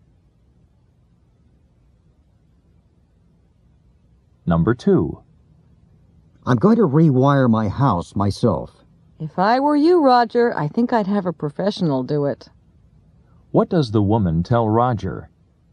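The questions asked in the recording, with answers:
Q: What does the woman tell Roger?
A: He should have a professional rewire the house.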